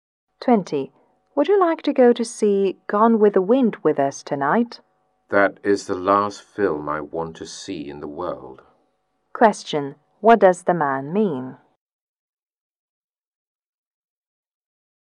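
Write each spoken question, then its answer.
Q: What does the man mean?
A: He doesn't want to see the film at all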